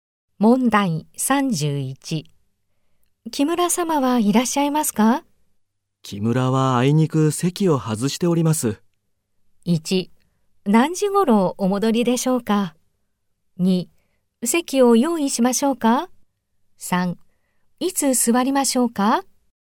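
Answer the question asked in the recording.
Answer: 1: 何時ごろお戻りでしょうか?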